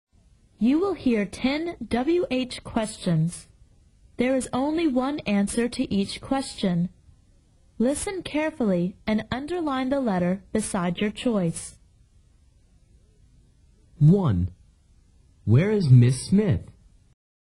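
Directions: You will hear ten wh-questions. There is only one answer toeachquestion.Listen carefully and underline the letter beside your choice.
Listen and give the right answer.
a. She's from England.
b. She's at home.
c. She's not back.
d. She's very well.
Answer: b. She's at home.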